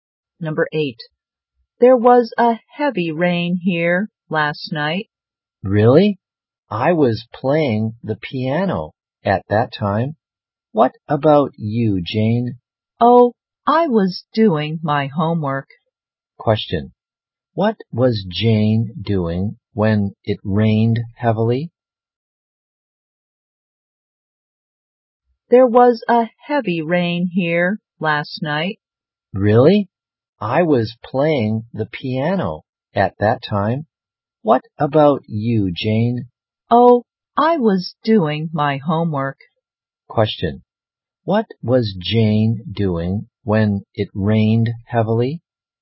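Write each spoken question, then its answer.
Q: Question, what was Jane doing when it rained heavily?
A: Doing her homework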